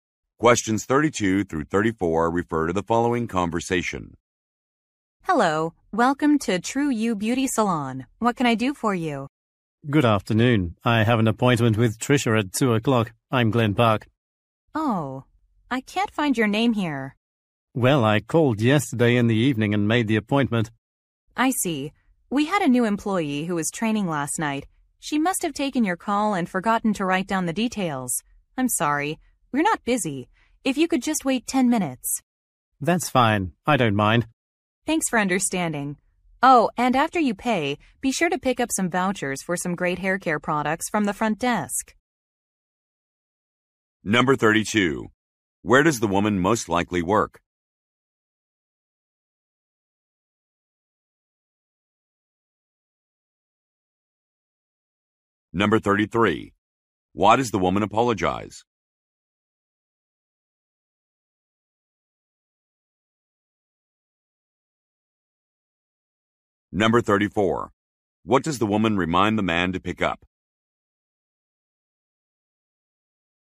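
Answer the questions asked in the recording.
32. At a beauty salon
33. The man's appointment was not written down
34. Vouchers for hair care products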